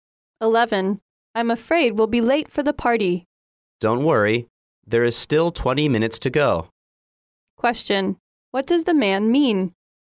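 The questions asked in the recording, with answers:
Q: What does the man mean?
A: They won't be late; there are still 20 minutes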